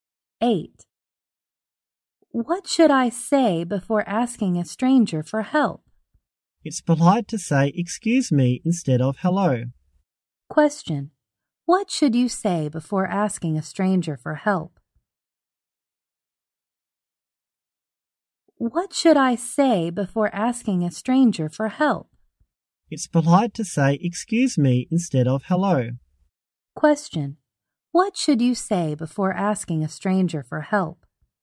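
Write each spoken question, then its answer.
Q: What should you say before asking a stranger for help?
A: Excuse me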